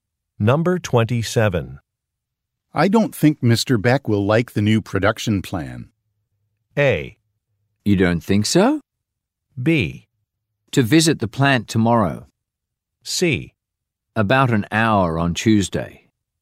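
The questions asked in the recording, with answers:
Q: I don't think Mr. Beck will like the new production plan.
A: A: You don't think so?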